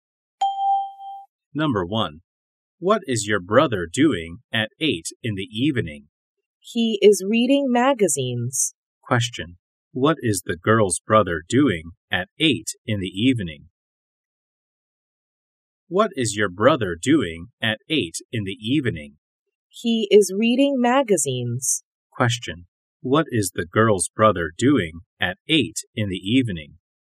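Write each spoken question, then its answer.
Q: What is the girl's brother doing at 8 in the evening?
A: He is reading magazines.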